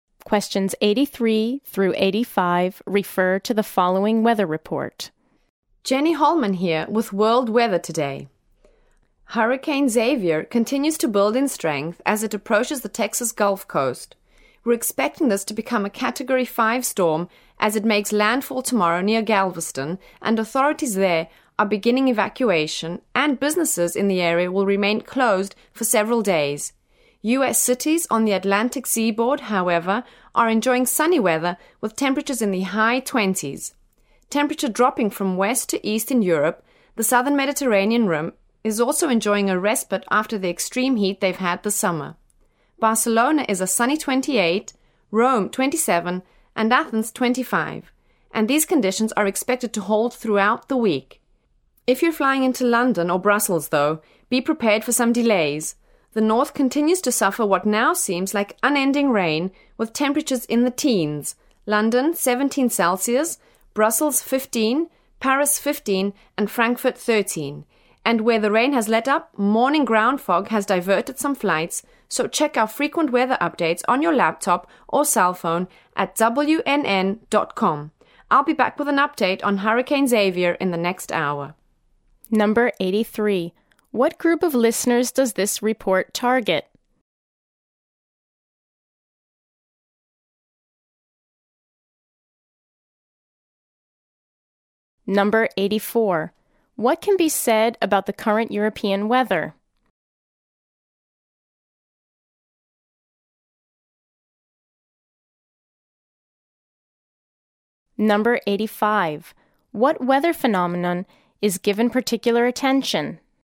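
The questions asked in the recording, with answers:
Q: What can be said about the current European weather?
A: Warmer and sunny in the south, rainy and cooler in the north

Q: What weather phenomenon is given particular attention?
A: Hurricane Xavier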